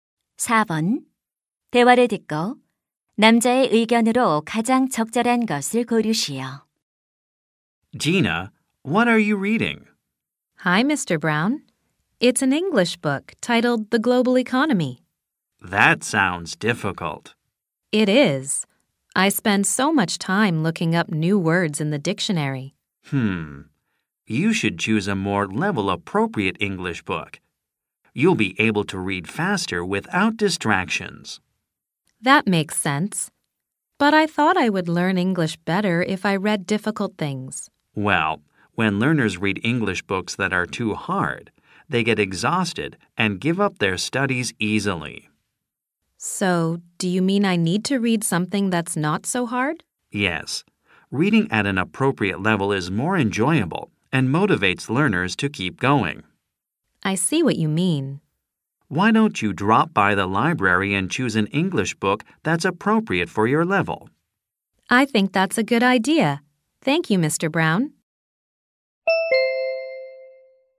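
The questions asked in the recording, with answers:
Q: 대화를 듣고 남자의 의견으로 가장 적절한 것을 고르시오.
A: 자신의 수준에 맞는 영어책을 읽어야 한다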